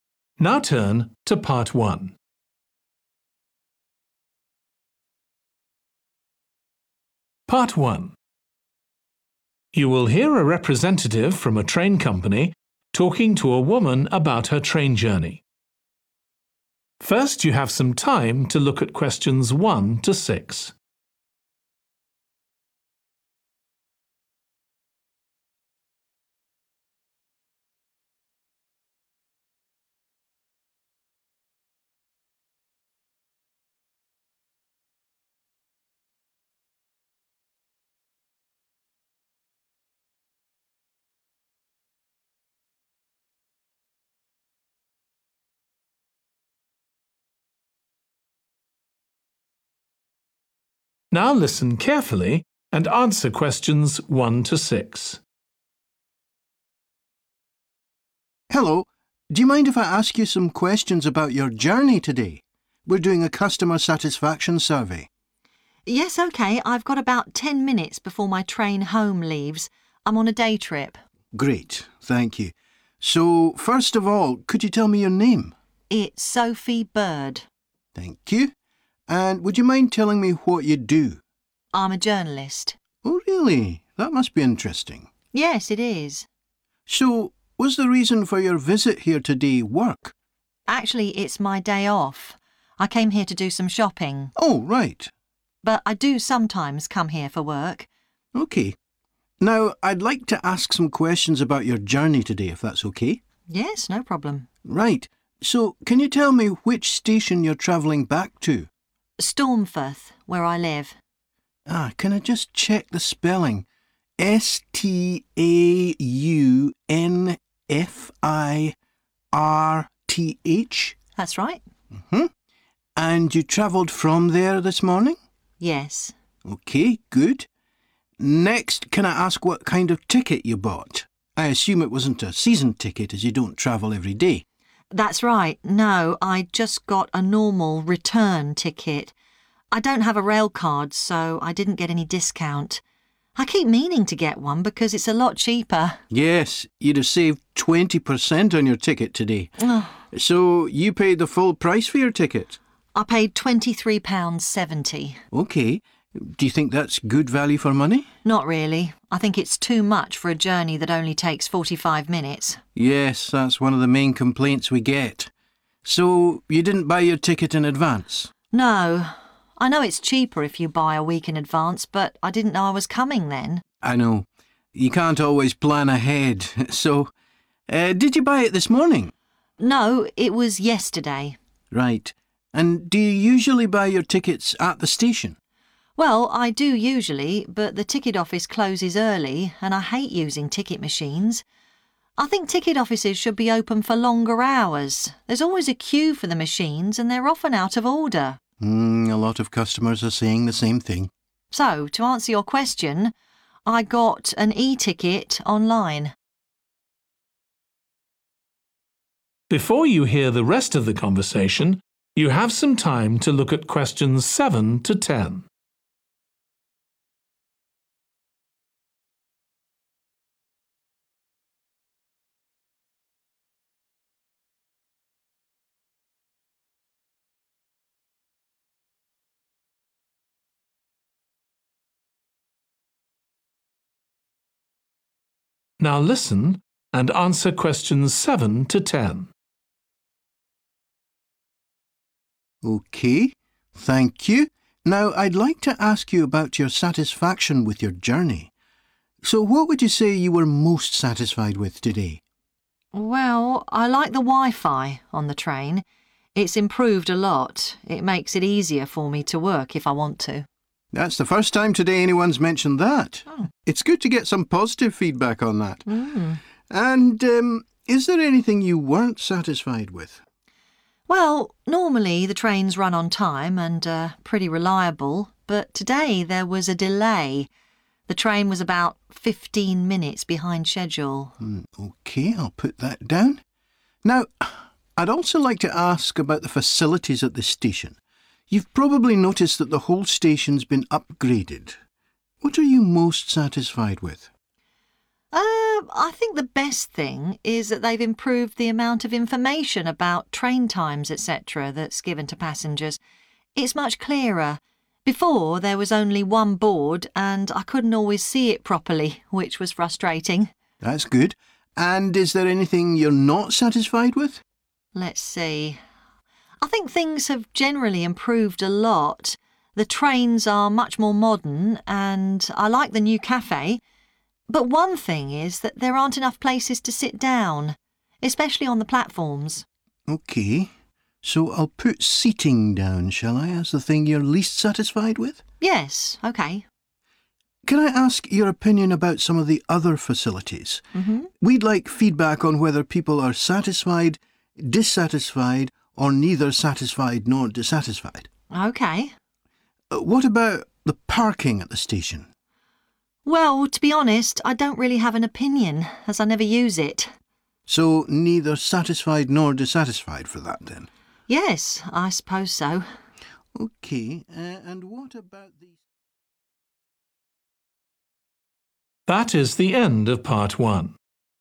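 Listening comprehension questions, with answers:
Complete the form below. Write ONE WORD AND/OR A NUMBER for each answer.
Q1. Occupation: 1.................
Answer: journalist

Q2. Reason for travel today: 2.................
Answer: shopping

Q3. Name of station returning to: 3.................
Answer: Staunfirth

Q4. Type of ticket purchased: Standard 4.................. ticket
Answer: return

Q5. Cost of ticket: 5 £................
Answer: 23.70

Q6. Where ticket was bought: 6..................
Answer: online

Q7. Least satisfied with: the 7................. this morning.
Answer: delay

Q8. Most satisfied with: how much 8............... was provided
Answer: information

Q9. Least satisfied with: lack of seats, particularly on the 9..................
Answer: platforms

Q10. Neither satisfied nor dissatisfied with: the 10.................. available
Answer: parking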